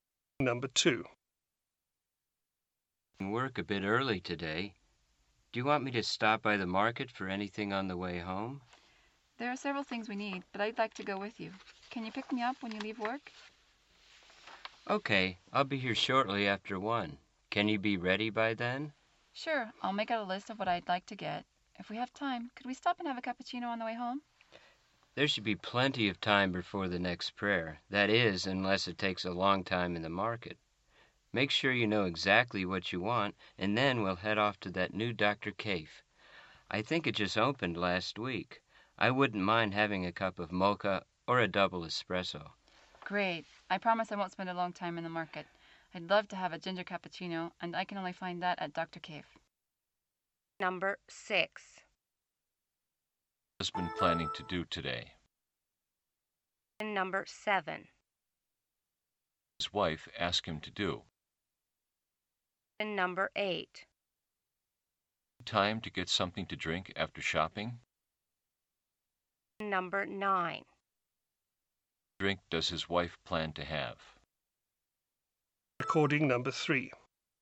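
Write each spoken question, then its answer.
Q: His wife asked him to do.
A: Pick her up when he leaves work

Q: What drink does his wife plan to have?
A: A ginger cappuccino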